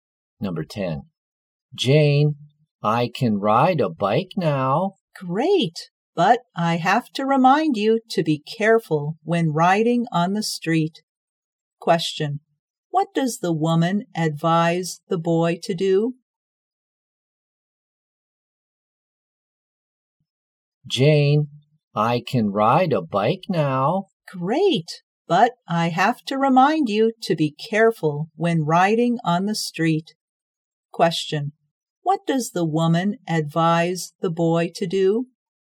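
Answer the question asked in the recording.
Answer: To be careful when riding on the street.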